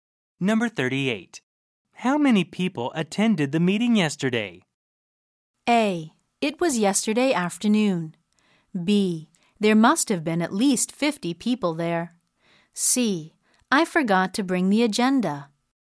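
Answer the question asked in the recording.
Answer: B: There must have been at least 50 people there.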